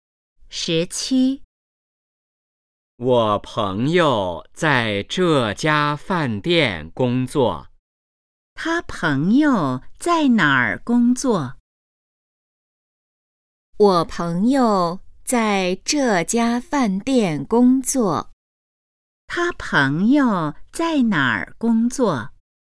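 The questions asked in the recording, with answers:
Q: 他朋友在哪儿工作?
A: 饭店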